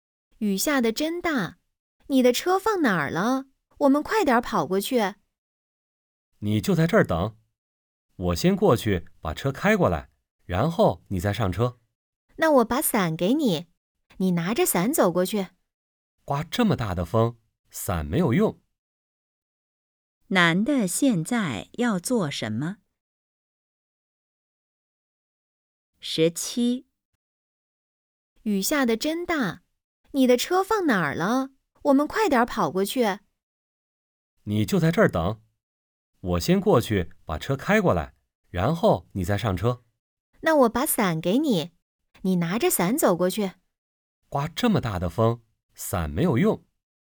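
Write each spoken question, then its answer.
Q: 男的现在要做什么?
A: 过去把车开过来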